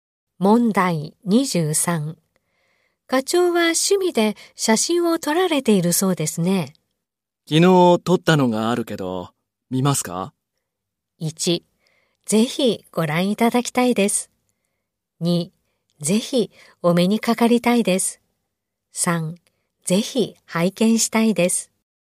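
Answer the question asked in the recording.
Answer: 3: ぜひ拝見したいです。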